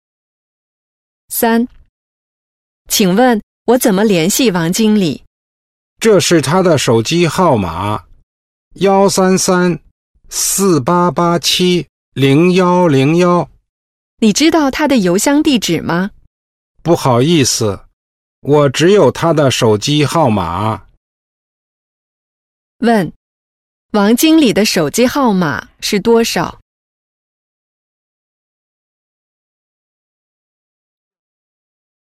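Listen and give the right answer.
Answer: 133-4887-0101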